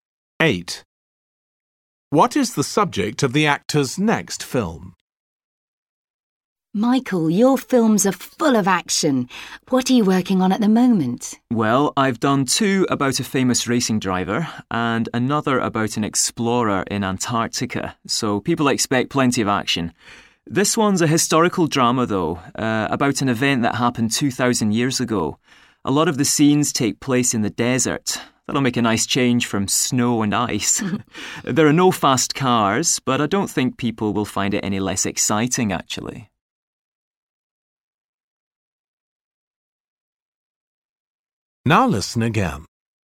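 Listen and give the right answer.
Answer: A historical event from 2,000 years ago, set in the desert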